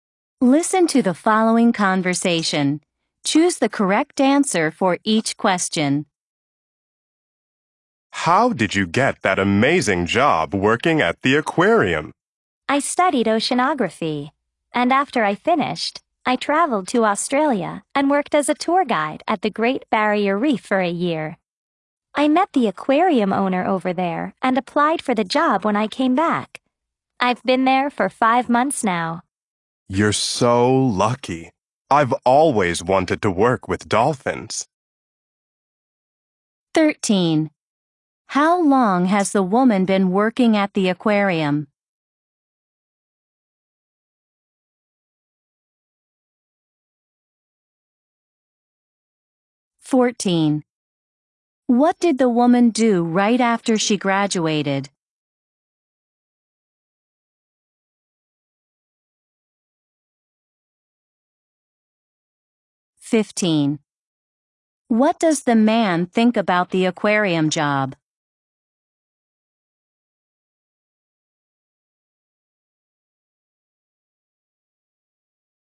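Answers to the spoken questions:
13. 5 months
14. She went to Australia and worked as a tour guide at the Great Barrier Reef
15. He thinks she is lucky; he has always wanted to work with dolphins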